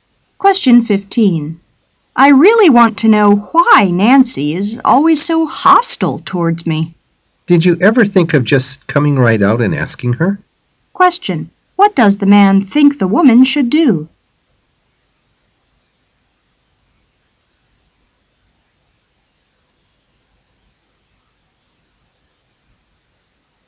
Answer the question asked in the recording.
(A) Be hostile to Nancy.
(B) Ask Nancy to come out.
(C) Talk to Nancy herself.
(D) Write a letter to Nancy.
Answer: (C) Talk to Nancy herself.

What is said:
[解析] W: I really want to know why Nancy is always so hostile towards me. M: Did you ever think of just coming right out and asking her? Q: What does the man think the woman should do?